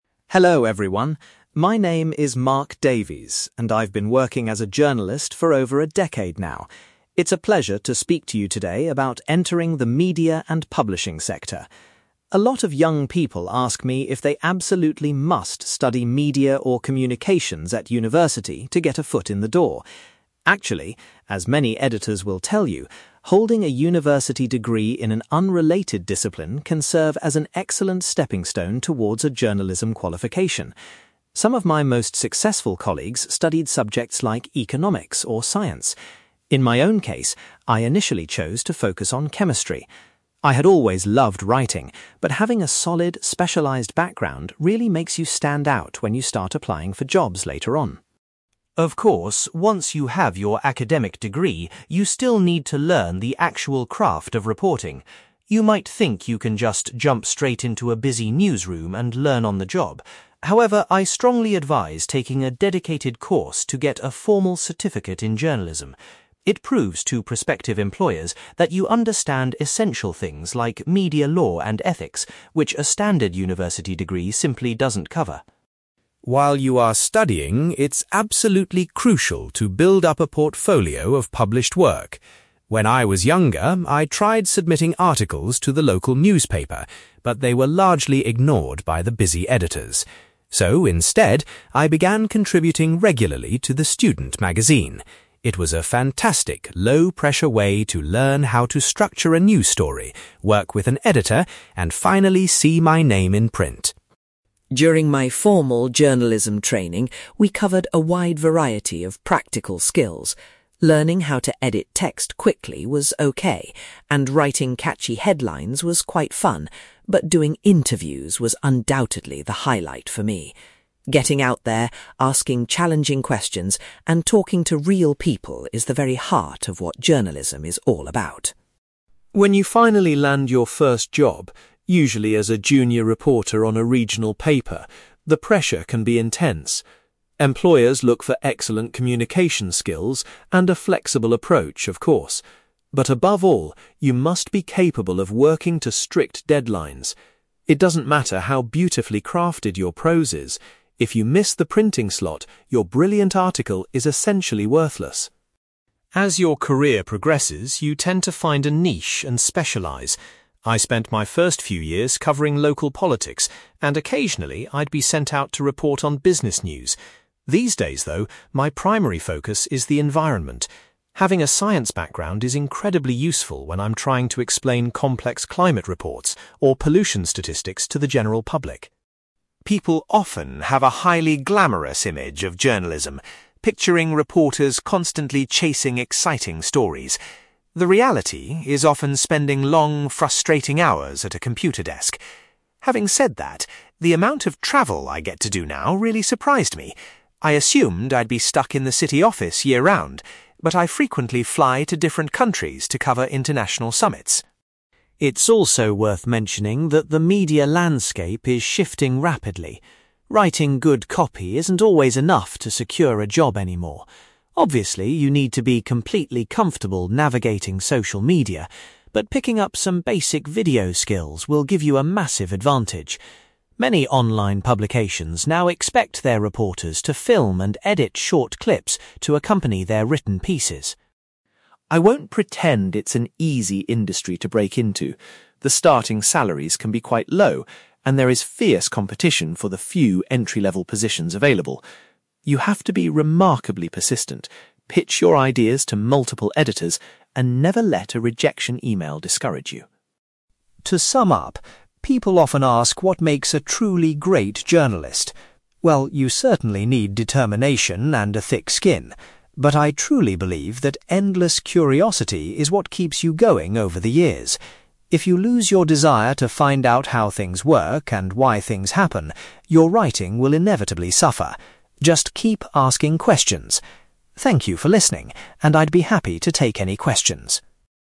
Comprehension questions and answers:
You will hear a journalist called Mark giving a presentation about entering the media and publishing profession. For questions 9-18, complete the sentences with a word or short phrase.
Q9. Mark decided to study (9)........................... at university instead of journalism.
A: chemistry

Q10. Mark explains that obtaining a journalism (10)........................... is highly recommended.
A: certificate

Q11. Mark first gained practical experience by writing for a (11)........................... .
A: student magazine

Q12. Mark found that conducting (12)........................... was his favourite part of his early training.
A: interviews

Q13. Mark emphasises the ability to meet (13)........................... as an essential skill for journalists.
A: deadlines

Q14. Currently, Mark focuses his reporting on issues related to the (14)........................... .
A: environment

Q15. Mark says the amount of (15)........................... involved in his current role was unexpected.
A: travel

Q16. Mark suggests that acquiring basic (16)........................... skills is increasingly important for modern reporters.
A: video

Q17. Mark warns that there is a lot of (17)........................... for entry-level jobs in the media.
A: competition

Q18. Mark believes that maintaining a sense of (18)........................... is the secret to a long career in journalism.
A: curiosity

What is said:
Mark: Hello everyone, my name is Mark Davies, and I've been working as a journalist for over a decade now. It's a pleasure to speak to you today about entering the media and publishing sector. A lot of young people ask me if they absolutely must study media or communications at university to get a foot in the door. Actually, as many editors will tell you, holding a university degree in an unrelated discipline can serve as an excellent stepping stone toward a journalism qualification. Some of my most successful colleagues studied subjects like economics or science. In my own case, I initially chose to focus on chemistry. I had always loved writing, but having a solid, specialised background really makes you stand out when you start applying for jobs later on.
Of course, once you have your academic degree, you still need to learn the actual craft of reporting. You might think you can just jump straight into a busy newsroom and learn on the job. However, I strongly advise taking a dedicated course to get a formal certificate in journalism. It proves to prospective employers that you understand essential things like media law and ethics, which a standard university degree simply doesn't cover.
While you are studying, it's absolutely crucial to build up a portfolio of published work. When I was younger, I tried submitting articles to the local newspaper, but they were largely ignored by the busy editors. So, instead, I began contributing regularly to the student magazine. It was a fantastic, low-pressure way to learn how to structure a news story, work with an editor, and finally see my name in print.
During my formal journalism training, we covered a wide variety of practical skills. Learning how to edit text quickly was okay, and writing catchy headlines was quite fun, but doing interviews was undoubtedly the highlight for me. Getting out there, asking challenging questions, and talking to real people is the very heart of what journalism is all about.
When you finally land your first job, usually as a junior reporter on a regional paper, the pressure can be intense. Employers look for excellent communication skills and a flexible approach, of course. But above all, you must be capable of working to strict deadlines. It doesn't matter how beautifully crafted your prose is; if you miss the printing slot, your brilliant article is essentially worthless.
As your career progresses, you tend to find a niche and specialise. I spent my first few years covering local politics, and occasionally I'd be sent out to report on business news. These days, though, my primary focus is the environment. Having a science background is incredibly useful when I'm trying to explain complex climate reports or pollution statistics to the general public.
People often have a highly glamorous image of journalism, picturing reporters constantly chasing exciting stories. The reality is often spending long, frustrating hours at a computer desk. Having said that, the amount of travel I get to do now really surprised me. I assumed I'd be stuck in the city office year-round, but I frequently fly to different countries to cover international summits.
It's also worth mentioning that the media landscape is shifting rapidly. Writing good copy isn't always enough to secure a job anymore. Obviously, you need to be completely comfortable navigating social media, but picking up some basic video skills will give you a massive advantage. Many online publications now expect their reporters to film and edit short clips to accompany their written pieces.
I won't pretend it's an easy industry to break into. The starting salaries can be quite low, and there is fierce competition for the few entry-level positions available. You have to be remarkably persistent, pitch your ideas to multiple editors, and never let a rejection email discourage you.
To sum up, people often ask what makes a truly great journalist. Well, you certainly need determination and a thick skin. But I truly believe that endless curiosity is what keeps you going over the years. If you lose your desire to find out how things work and why things happen, your writing will inevitably suffer. Just keep asking questions! Thank you for listening, and I'd be happy to take any questions.

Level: B2